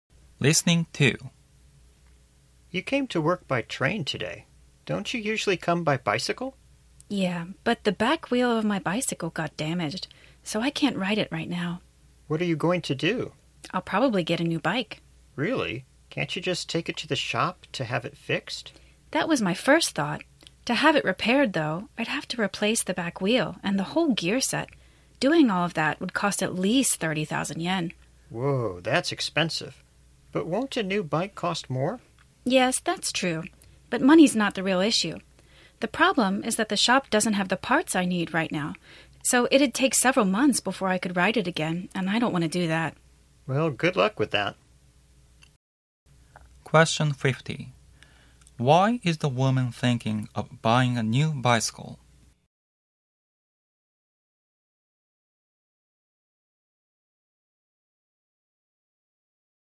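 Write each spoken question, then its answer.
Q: Why is the woman thinking of buying a new bicycle?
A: Repairing it would take several months because the shop doesn't have the parts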